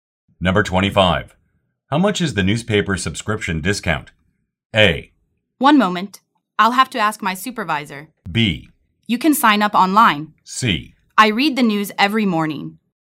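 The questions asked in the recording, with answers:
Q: How much is the newspaper subscription discount?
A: A: 1 moment. I'll have to ask my supervisor.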